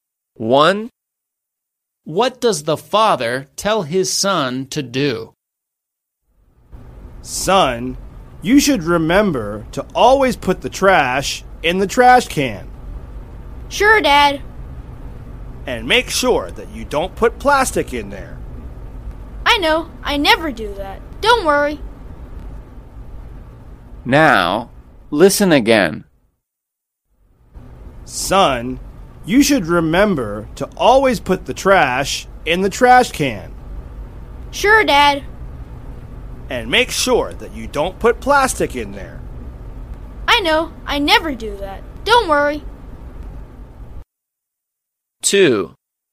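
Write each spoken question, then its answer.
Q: What does the father tell his son to do?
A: Always put the trash in the trash can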